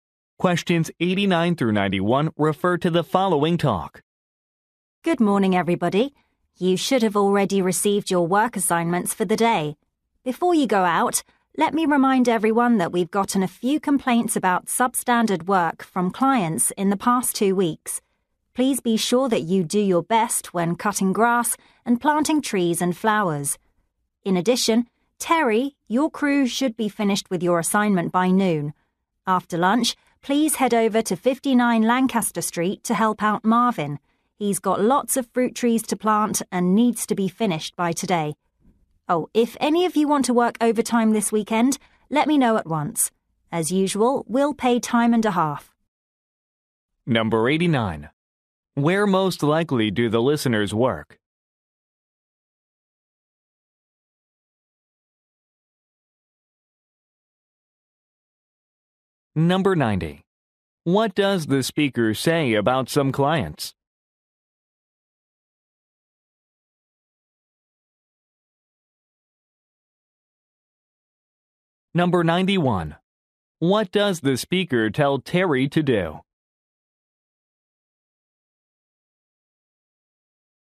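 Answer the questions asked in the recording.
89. At a landscaping company
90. They complained about substandard work
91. Help Marvin at 59 Lancaster Street after lunch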